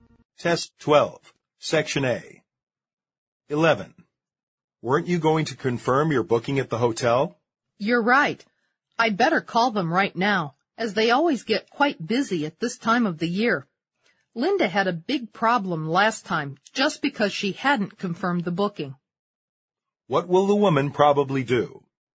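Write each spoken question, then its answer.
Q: What will the woman probably do?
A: Call the hotel to confirm her booking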